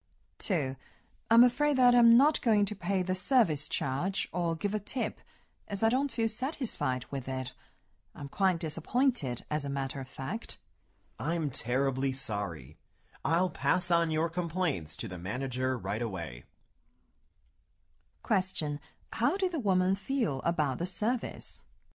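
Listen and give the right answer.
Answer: Disappointed / dissatisfied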